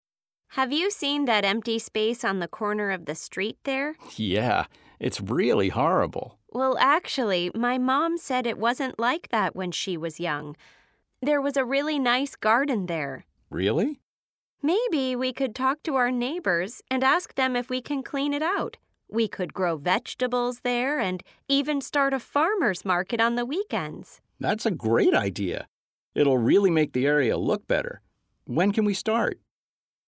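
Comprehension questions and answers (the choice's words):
Listen to the conversation and choose the correct answer.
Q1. What are the friends talking about?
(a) which area they like best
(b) the empty space on the street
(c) the garden growing at their house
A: the empty space on the street

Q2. In the past, the empty space was a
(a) city park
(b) school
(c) garden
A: garden

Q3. Who do the friends decide to talk to about their idea?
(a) the neighbors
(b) their parents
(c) some farmers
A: the neighbors

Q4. The friends plan to plant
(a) trees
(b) flowers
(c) vegetables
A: vegetables

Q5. They want to start a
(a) farmers' market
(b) grocery store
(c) cleaning business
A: farmers' market

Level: A2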